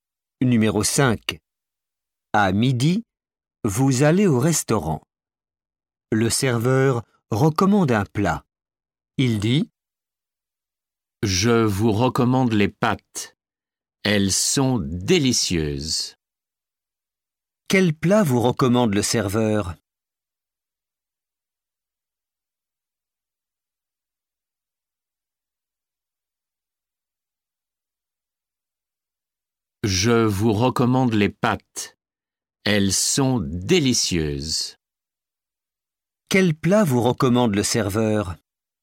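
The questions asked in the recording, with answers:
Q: Quel plat vous recommande le serveur?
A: Les pâtes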